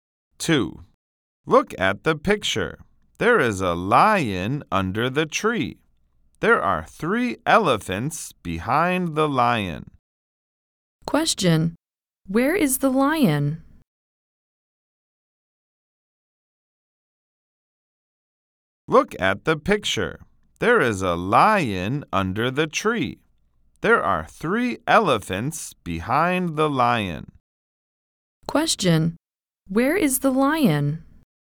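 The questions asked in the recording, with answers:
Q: Question. Where is the lion?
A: Under the tree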